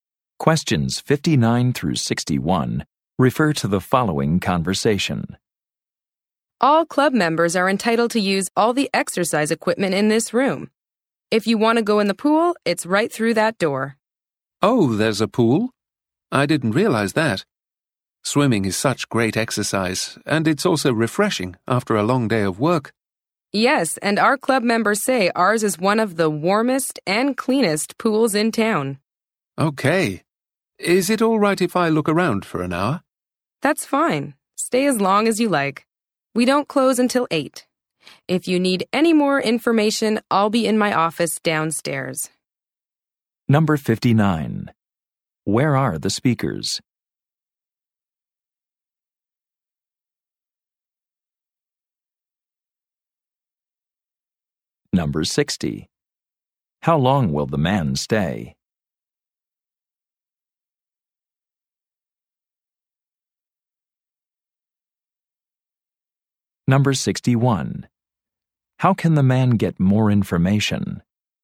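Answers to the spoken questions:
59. At a health club's exercise room
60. An hour
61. Go to the office downstairs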